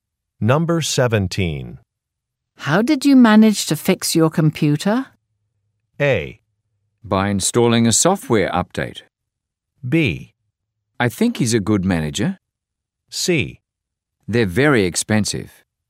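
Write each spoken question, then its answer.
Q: How did you manage to fix your computer?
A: A: By installing a software update.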